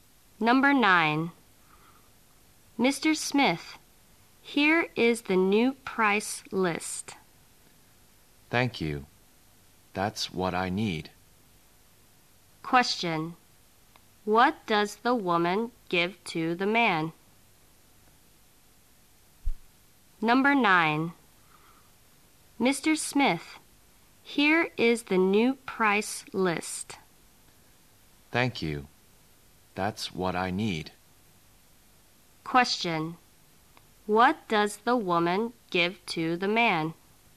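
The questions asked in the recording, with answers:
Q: What does the woman give to the man?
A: The new price list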